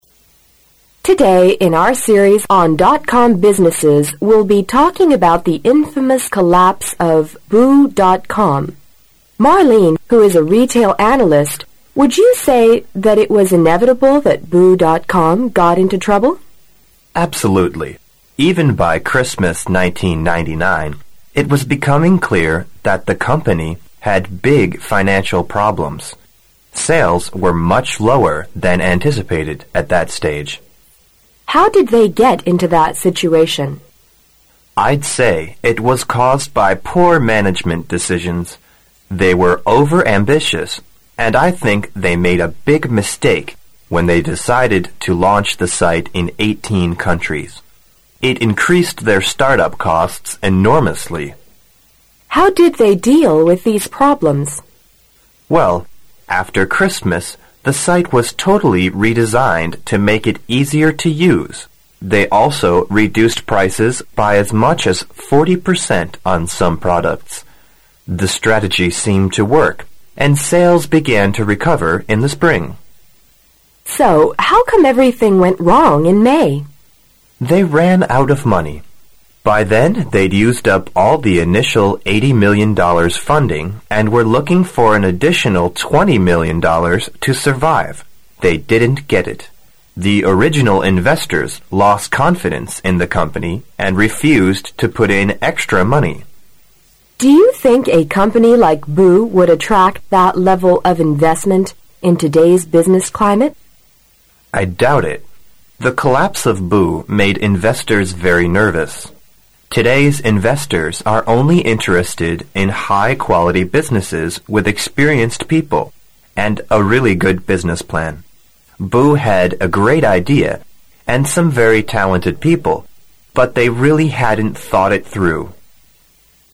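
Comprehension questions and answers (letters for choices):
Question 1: What is the probable relationship between the two speakers?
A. Professor and postgraduate student.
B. Interviewer and analyst.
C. Customer and businessman.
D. Parent and child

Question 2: What was the result of the changes boo.com made after Christmas 1999?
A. Their website was much expanded.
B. Their spending was cut by 40 percent.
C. Their sales improved slightly.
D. Their profits dropped.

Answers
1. B
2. C

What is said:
W: Today in our series on.com businesses, we'll be talking about the infamous collapse of boo.com. Marlene, who is a retail analyst, would you say that it was inevitable that boo.com got into trouble?
M: Absolutely. Even by Christmas 1999 it was becoming clear that the company had big financial problems. Sales were much lower than anticipated at that stage.
W: How did they get into that situation?
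M: I'd say it was caused by poor management decisions. They were over-ambitious and I think they made a big mistake when they decided to launch the site in eighteen countries. It increased their start-up costs enormously.
W: How did they deal with these problems?
M: Well, after Christmas the site was totally redesigned to make it easier to use. They also reduced prices by as much as 40 percent on some products. The strategy seemed to work and sales began to recover in the spring.
W: So how come everything went wrong in May?
M: They ran out of money. By then they'd used up all the initial $80 million funding and were looking for an additional $20 million to survive. They didn't get it. The original investors lost confidence in the company and refused to put in extra money.
W: Do you think a company like Boo would attract that level of investment in today's business climate?
M: I doubt it. 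The collapse of Boo made investors very nervous. Today's investors are only interested in high quality businesses with experienced people, and a really good business plan. Boo had a great idea and some very talented people, but they really hadn't thought it through.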